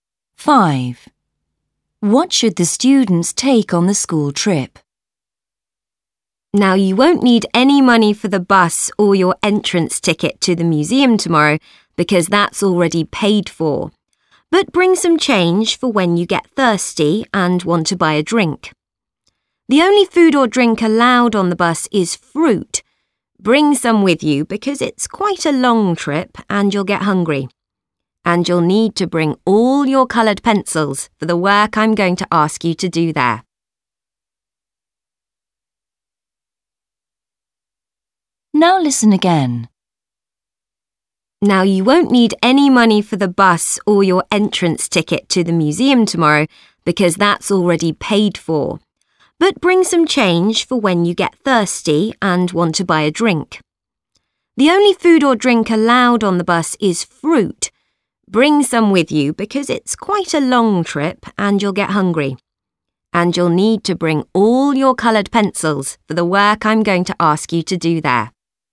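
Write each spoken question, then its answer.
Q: What should the students take on the school trip?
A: Some change for a drink, fruit and coloured pencils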